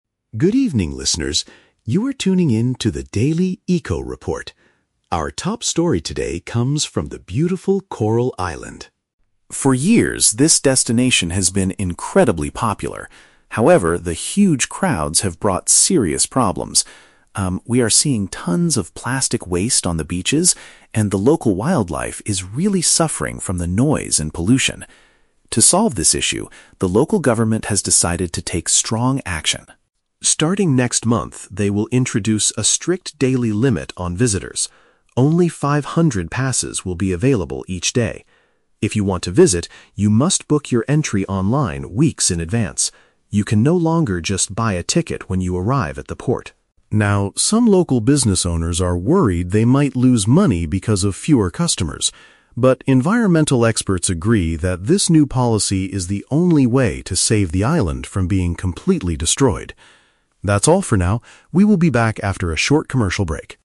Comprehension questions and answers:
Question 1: What is the main reason for the government's new rule?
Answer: To protect nature from the negative effects of too many tourists.

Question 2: How can tourists get permission to enter the island next month?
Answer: By reserving their spot on the internet before their trip.

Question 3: How do the environmental experts feel about this change?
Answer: They believe it is absolutely necessary to protect the area.

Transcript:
James: Good evening, listeners. You are tuning in to the Daily Eco-Report. Our top story today comes from the beautiful Coral Island.
For years, this destination has been incredibly popular. However, the huge crowds have brought serious problems. Um, we are seeing tons of plastic waste on the beaches, and the local wildlife is really suffering from the noise and pollution. To solve this issue, the local government has decided to take strong action.
Starting next month, they will introduce a strict daily limit on visitors. Only five hundred passes will be available each day. If you want to visit, you must book your entry online weeks in advance. You can no longer just buy a ticket when you arrive at the port.
Now, some local business owners are worried they might lose money because of fewer customers. But environmental experts agree that this new policy is the only way to save the island from being completely destroyed. That's all for now, we will be back after a short commercial break.